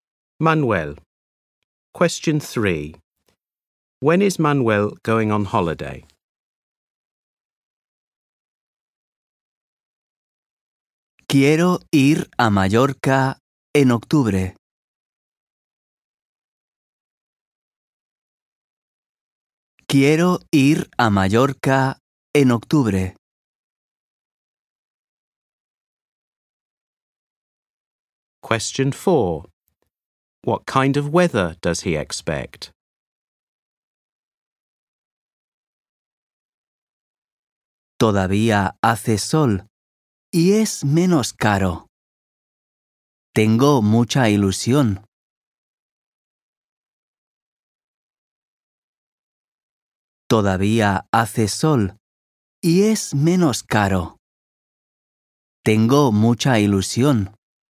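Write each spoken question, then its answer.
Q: When is Manuel going on holiday?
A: In October

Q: What kind of weather does he expect?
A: Sunny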